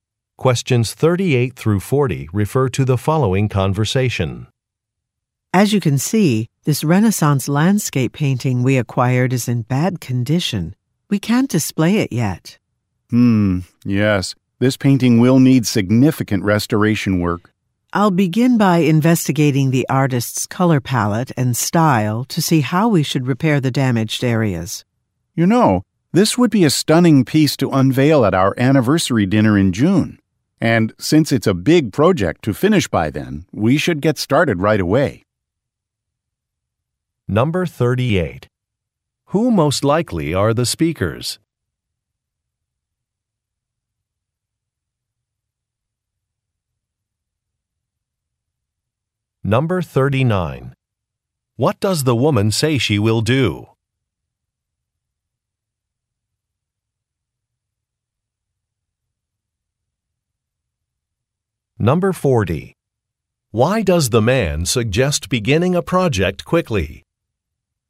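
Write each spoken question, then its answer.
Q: What does the woman say she will do?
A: Investigate the artist's color palette and style

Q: Why does the man suggest beginning a project quickly?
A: To unveil the painting at the anniversary dinner in June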